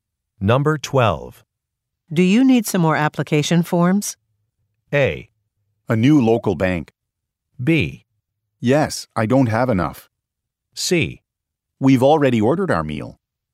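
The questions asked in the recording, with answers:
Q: Do you need some more application forms?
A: B: Yes, I don't have enough.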